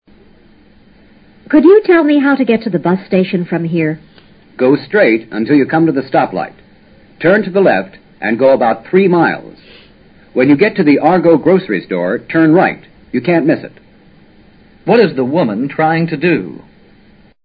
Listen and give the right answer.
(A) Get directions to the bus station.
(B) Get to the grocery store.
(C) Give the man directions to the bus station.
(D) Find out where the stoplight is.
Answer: (A) Get directions to the bus station.

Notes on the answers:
她的问话本身明确地回答了问题。男子的答话和B,C,D三项都是设置的干扰。 go straight: 照直走。 stoplight: 停车标志灯(交通标志)。 Argo Grocery Store: 食品商店名。